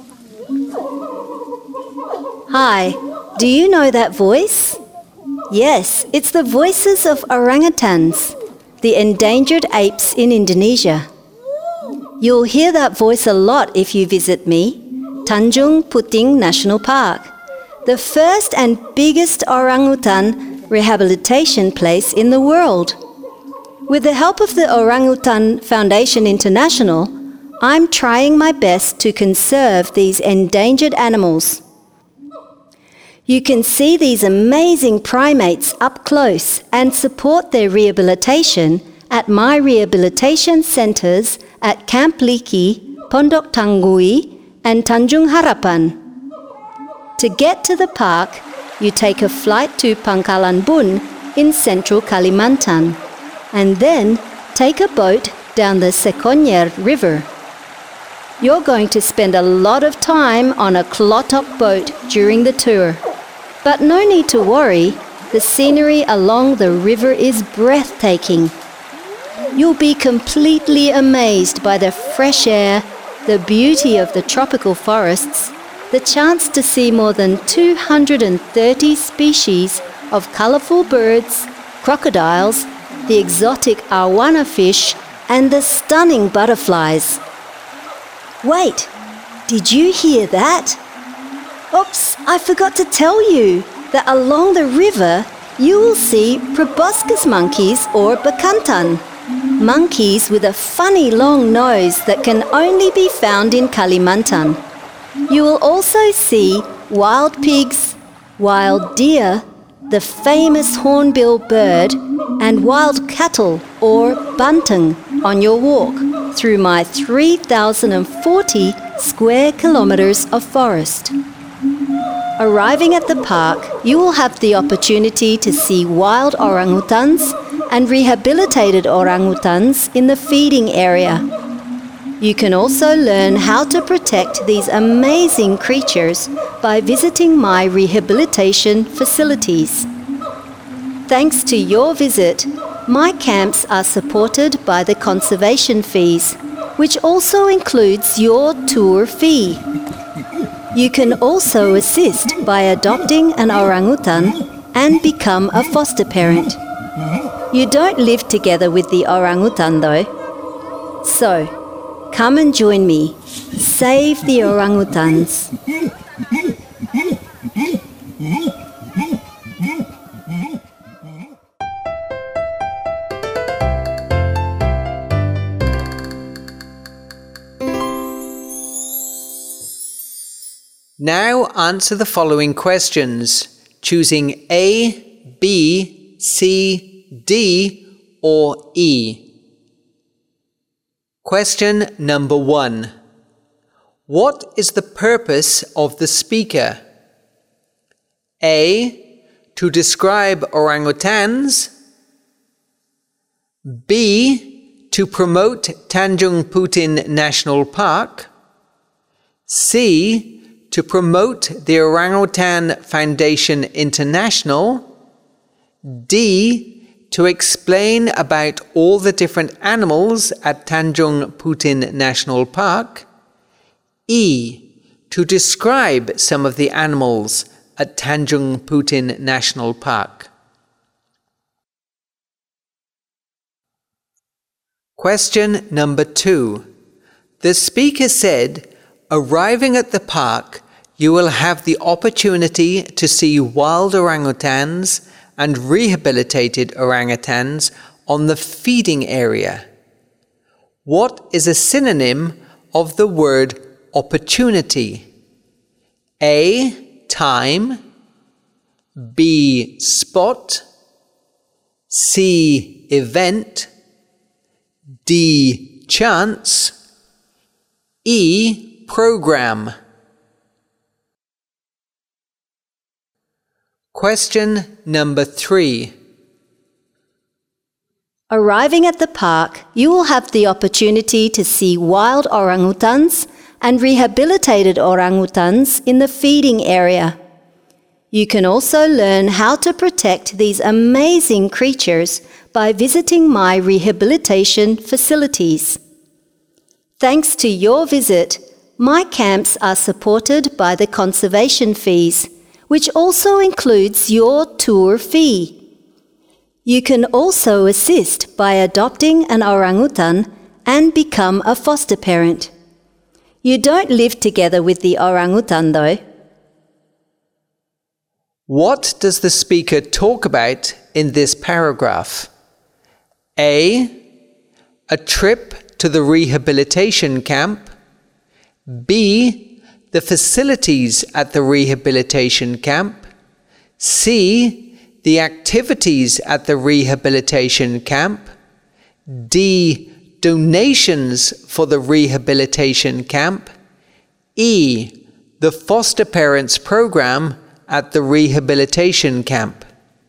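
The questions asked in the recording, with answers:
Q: What is the purpose of the speaker?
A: B: To promote Tanjung Puting National Park.

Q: What is a synonym of the word opportunity?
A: D: Chance.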